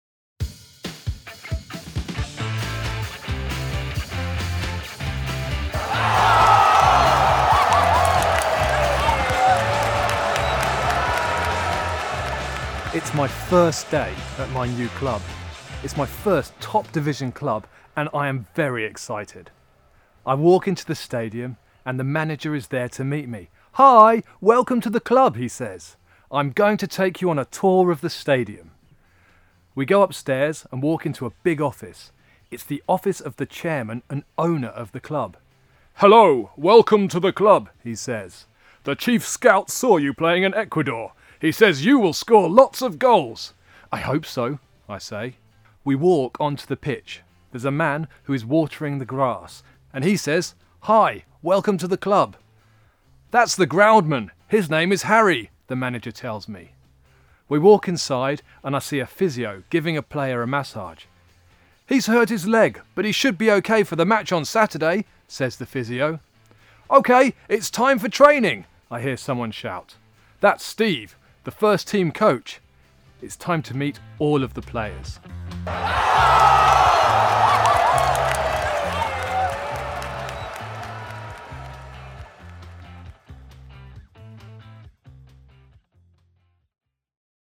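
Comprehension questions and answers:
Listen to the player's first day and try to answer these questions:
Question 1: Who does the new player meet?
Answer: The manager, the chairman and owner, Harry the groundsman, the physio and Steve the first team coach

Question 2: How is the player feeling?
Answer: Very excited

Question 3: Who is he going to meet next?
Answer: All of the players

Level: Language level: 2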